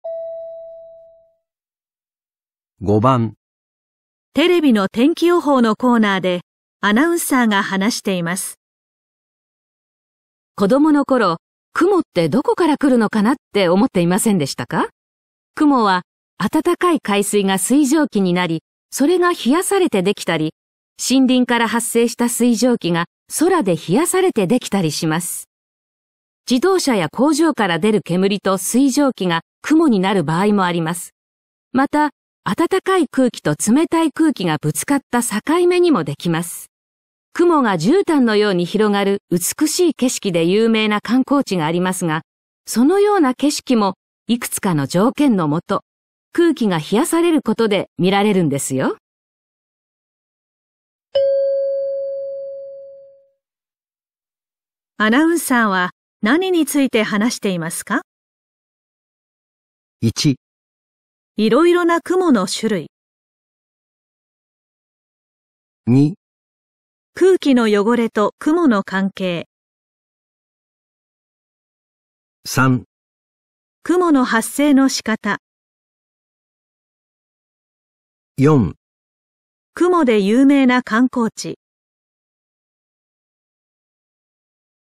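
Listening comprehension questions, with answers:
アナウンサーは何について話していますか。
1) いろいろな雲の種類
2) 空気の汚れと雲の関係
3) 雲の発生の仕方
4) 雲で有名な観光地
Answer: 3) 雲の発生の仕方

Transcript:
女:子供の頃、雲ってどこから来るのかなって思っていませんでしたか。雲は暖かい海水が水 蒸気になり、それが冷やされて出来たり、森林から発生した水蒸気が冷やされて出来たりしま す。自動車や工場から出る煙と水蒸気が雲になる場合もあります。また、暖かい空気と冷たい 空気 がぶつかった境目にもできます。雲が絨毯のように広がる美しい景色で有名な観光地があ りますが、そのような景色もいくつかの条件のもと、空気 が冷やされることで見られるんです よ。

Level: N2

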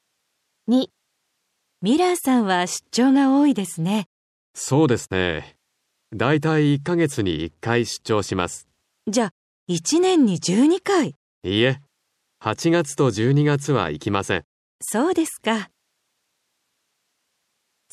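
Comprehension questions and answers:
3.1日・1週間・1年に 何回 しますか。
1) ミラーさんは 1年に { 1 10 12}回 出張します。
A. 1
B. 10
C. 12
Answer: B. 10

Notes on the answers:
B: そうですね。 だいたい1か月に 1回出張します。 A: じゃ、 1年に12回! B: いいえ、 8月と 12月は 行きません。

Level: N5

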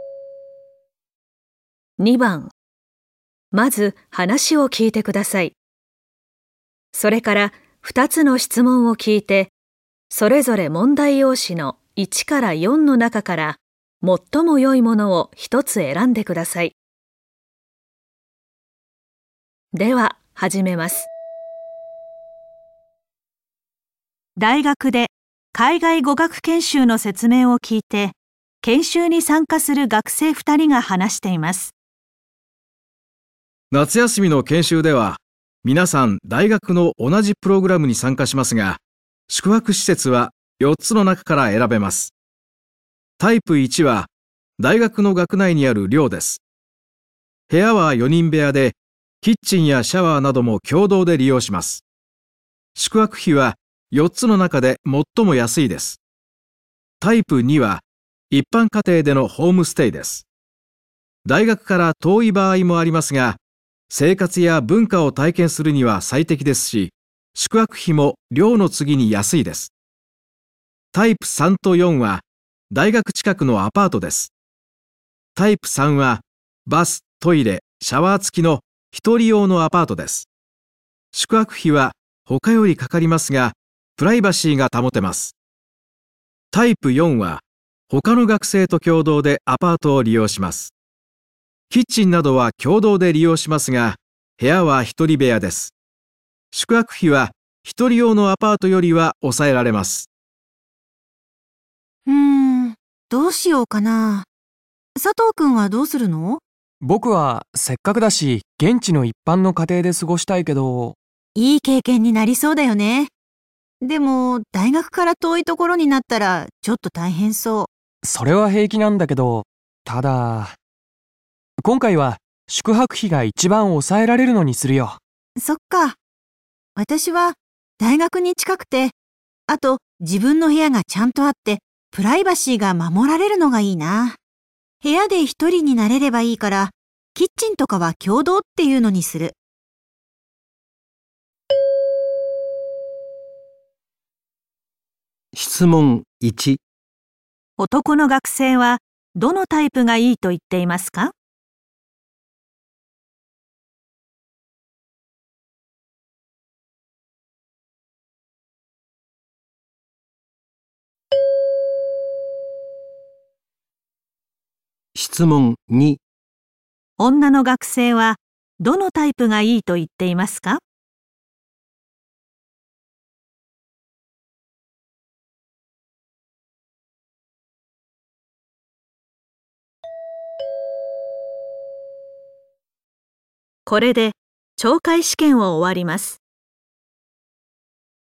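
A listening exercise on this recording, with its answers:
まず話を聞いてください。それから、二つの質問を聞いて、それぞれ問題用紙の1から4の中から、最もよいものを一つ選んでください。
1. タイプ 1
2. タイプ 2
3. タイプ 3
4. タイプ 4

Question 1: 質問 1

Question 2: 質問 2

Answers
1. 1. タイプ 1
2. 4. タイプ 4

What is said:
夏休みの研修では、皆さん、大学の同じプログラムに参加しますが、宿泊施設は4つの中から選べます。大学から遠い場合もありますが、生活 や文化を体験するには最適ですし、宿泊費も寮の次に安いです。タイプ3と4は、大学近くのアパートです。タイ プ3はバス、トイレ、シャワー付きの1人用のアパートです。宿泊費は他よりかかりますが、プライバシーが保って ます。キッチンなどは共同で利用しますが、部屋は1人部 屋です。
女:どうしようかな..佐藤君はどうするの?
男:僕はせっかくだし、現地の一般の家庭で過ごしたいけど..
女:いい経験になりそうだよね、でも、大学から遠い所になったら、ちょっと大変そう。
男:それは平気なんだけど、ただ今回は宿泊費が一番抑えられるのにするよ。 女:そうか。私は大学に近くて、あと自分の部屋がちゃんとあって、プライバシーが守られるのがいいなぁ。部屋 で一人になれればいいから、キッチンとかは共同っていうのにする。

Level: N2 第3回】聴解

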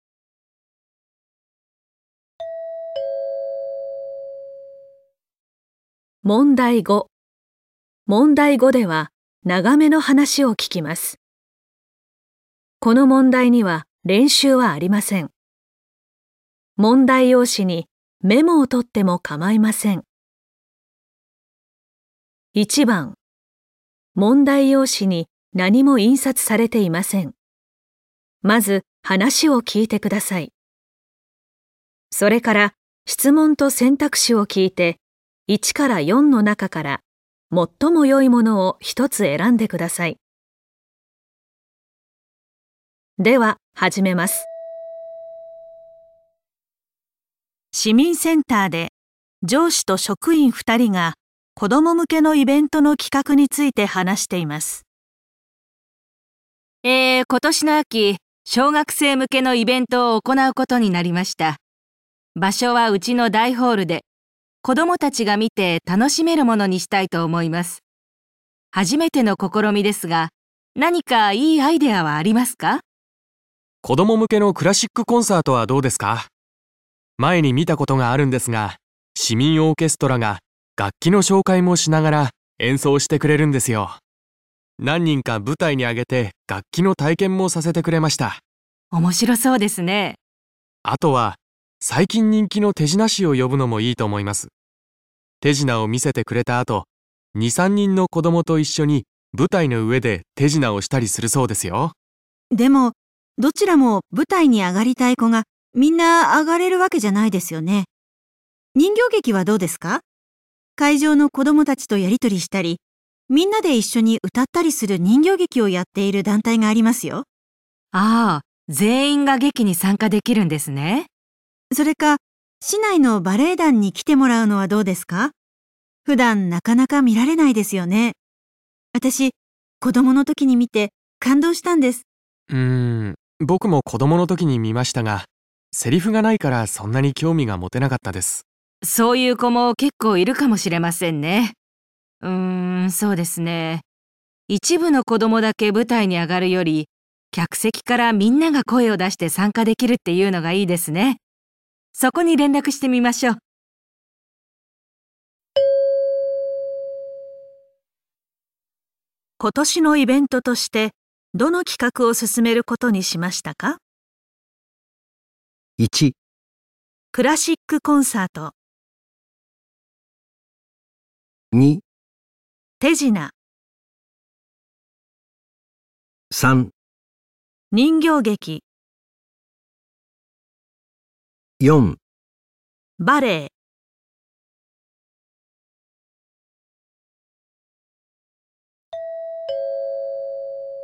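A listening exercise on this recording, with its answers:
問題用紙に何もいんさつされていません。まず話を聞いてください。それから、質問とせんたくしを聞いて、1から4の中から、最もよいものを一つ選んでください。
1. 今年のイベントとして どの企画を進めることにしましたか。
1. ラシックコンサート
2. 手品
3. 人形劇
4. バレエ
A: 3. 人形劇

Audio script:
上司:今年の秋、小学生向けのイベントを行うことになりました。場所はうちの大ホールで子供達がみて楽しめ る物にしたいと思います。初めての試みですが、何かいいアイディアはありますか。
職員1:子供むけのクラシックコンサートはどうですか。前に見たことがあるんですが..。市民オーケストラが楽 器を紹介もしながら演奏してくれるんですよ。何人か舞台にあげて楽器の体験もさせてくれました。
上司:面白そうですね。
職員2:あとは最近人気の手品ショーを呼びのもいいと思います。手品を見せてくれた後、2、3人の子供と一 緒に舞台の上で手品をしたらするそうですよ。
上司:でも、どちらも舞台に上がりたい子が皆上がれるわけじゃないですよね。会場の 子供達とやり取りしたり、皆で一緒に歌ったりする人形劇をやっている団体がありますよ。あ、全員が劇に参加 できるんですね。それか、市内のバレエ団に来てもらうのはどうですか。普段、なかなか見られないんですよ ね。私子供の時に見て 感動したんです。
職員1:うーん、僕も子供の時にみましたが、セリフがないから、そんなに興味が持てなかったです。
上司:そういう子も結構いるかもしれませんね。一部の子供だけ舞台に上がるより客席か ら皆が声を出して参加できるっていうのがいいですね。そこに連絡してみましょう。

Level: N2 第3回】聴解

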